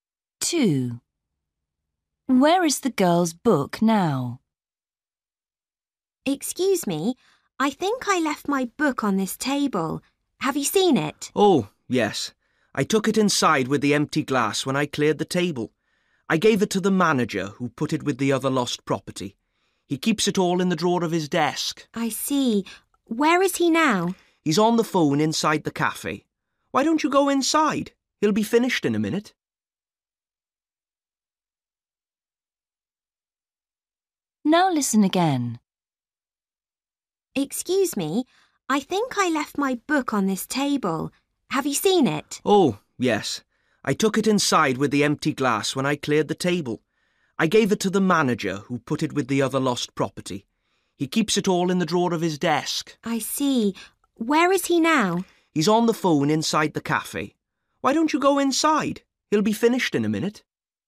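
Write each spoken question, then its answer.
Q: Where is the girl's book now?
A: in the drawer of the manager's desk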